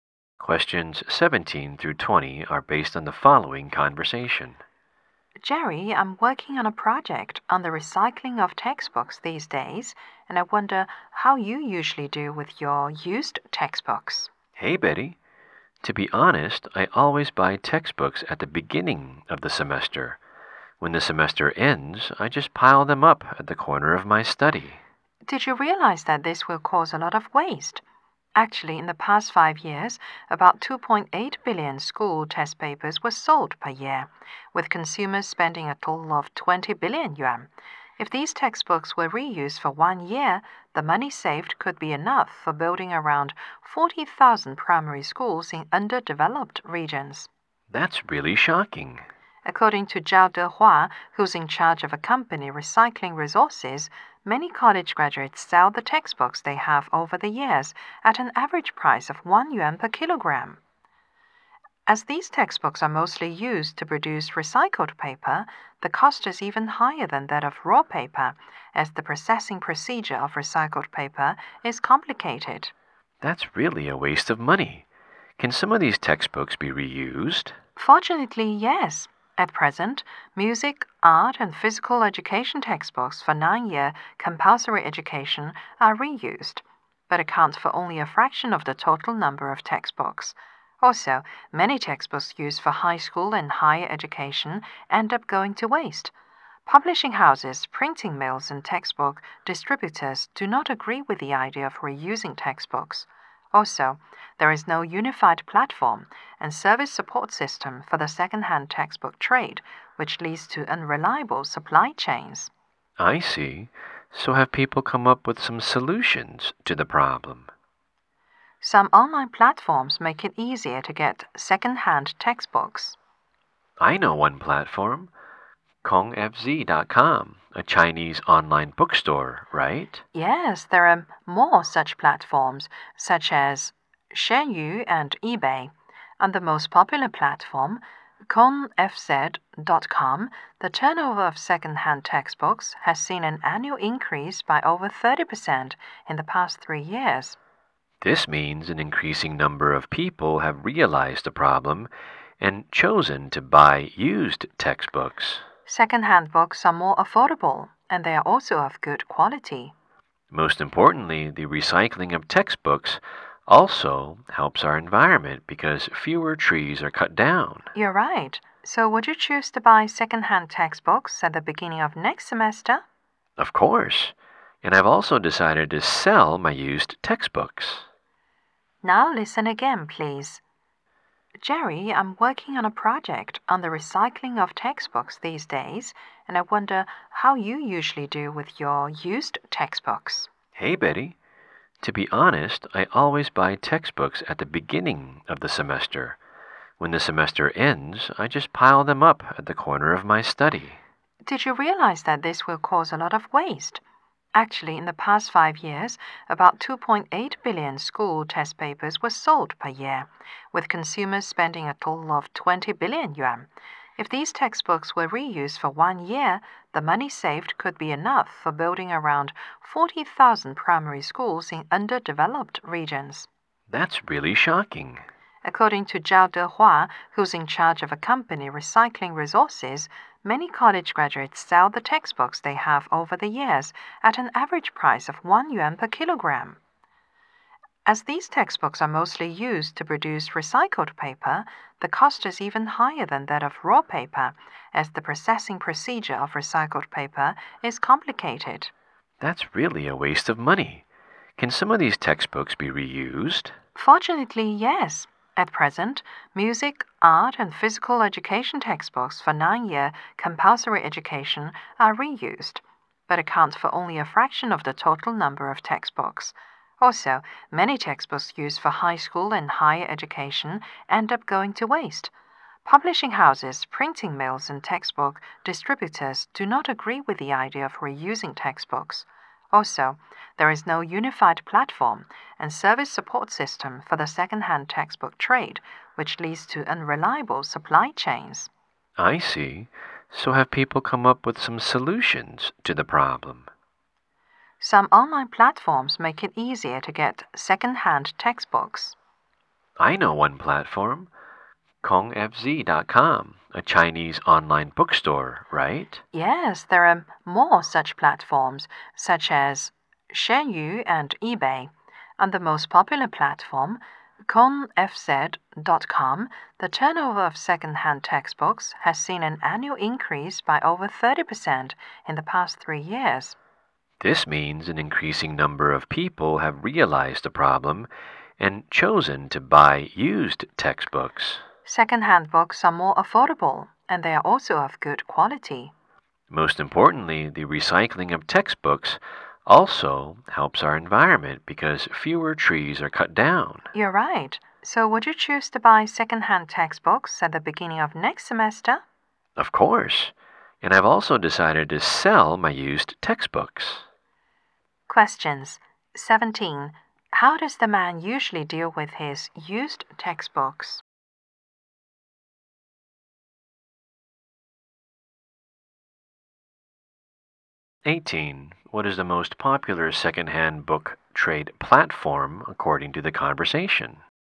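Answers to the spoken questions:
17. He piles them up in the corner of his study
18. KongFZ.com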